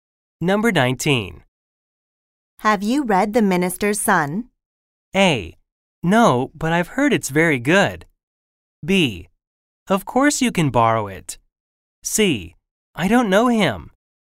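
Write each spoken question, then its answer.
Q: Have you read The Minister's Son?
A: A: No, but I've heard it's very good.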